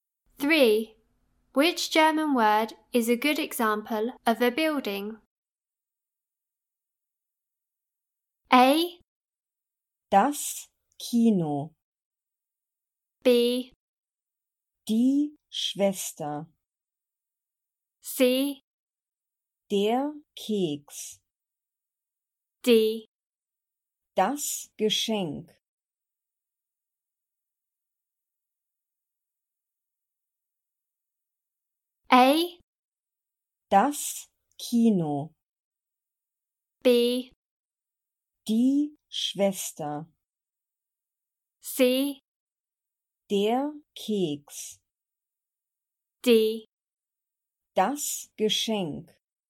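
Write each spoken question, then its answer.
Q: Which German word is a good example of a building?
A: A: Das Kino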